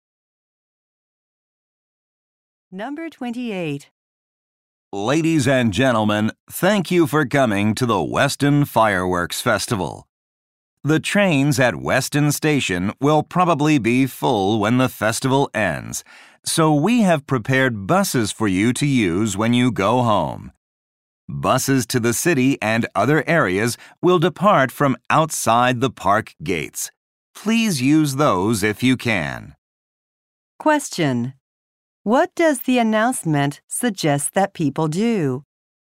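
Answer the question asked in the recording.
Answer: Take buses home.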